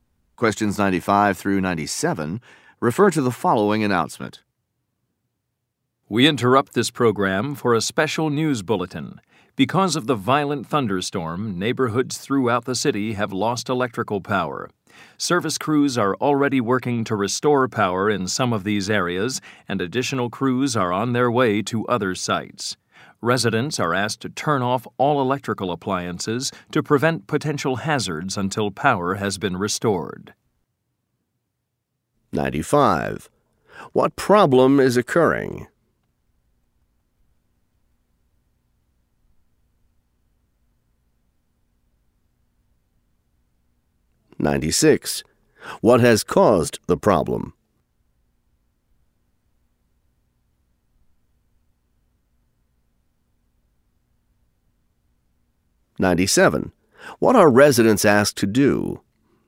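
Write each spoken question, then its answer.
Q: What problem is occurring?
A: A power outage

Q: What has caused the problem?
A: A violent thunderstorm

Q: What are residents asked to do?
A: Turn off all electrical appliances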